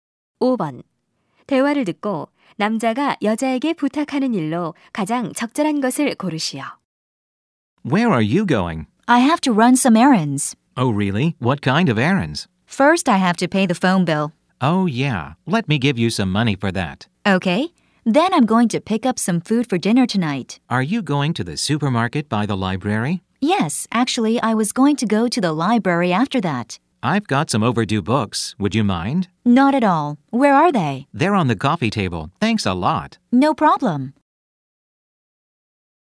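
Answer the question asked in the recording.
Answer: 연체된 책을 도서관에 반납해 주기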